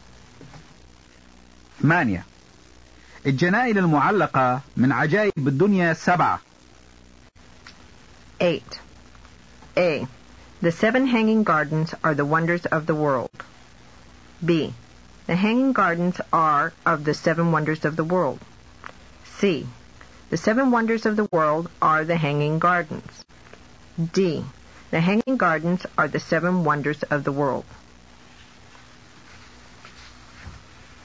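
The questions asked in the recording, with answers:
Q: الجنائن المعلقة من عجائب الدنيا 7.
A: B: The hanging gardens are of the seven wonders of the world.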